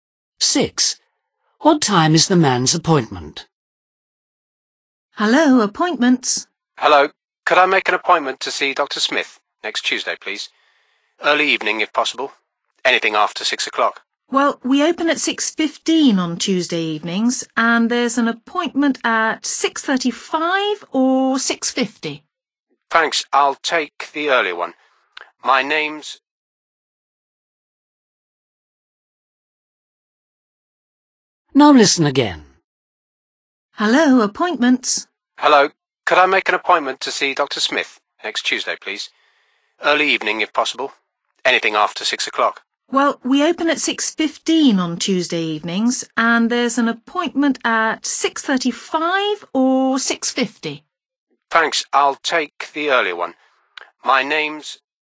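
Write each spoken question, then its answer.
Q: What time is the man's appointment?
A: 6:35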